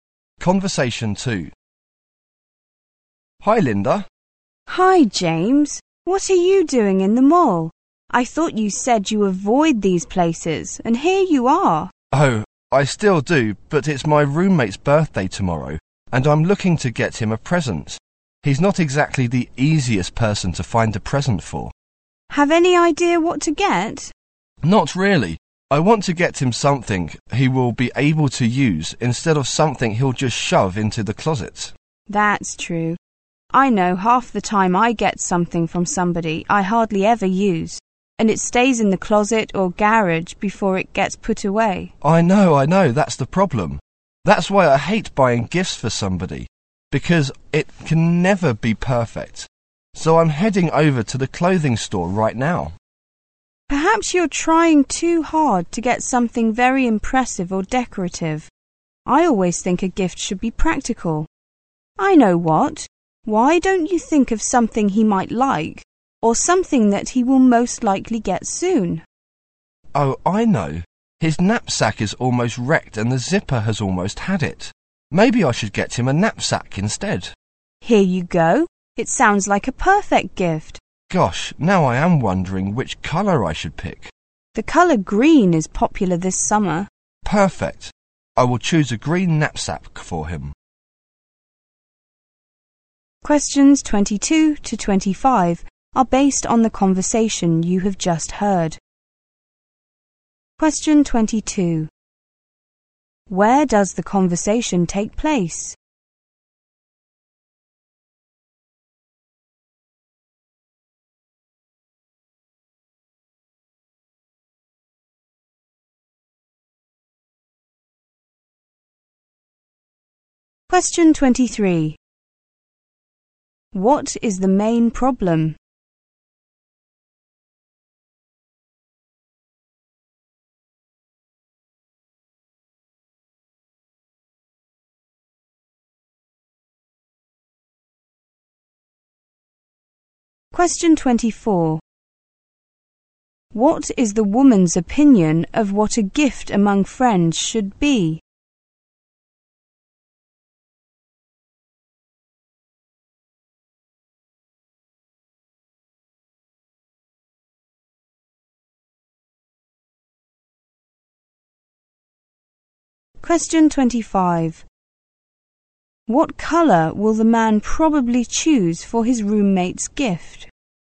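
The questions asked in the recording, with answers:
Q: Where does the conversation take place?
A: In a mall

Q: What is the main problem?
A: Finding a birthday present for the man's roommate

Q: What is the woman's opinion of what a gift among friends should be?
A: It should be practical

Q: What colour will the man probably choose for his roommate's gift?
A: Green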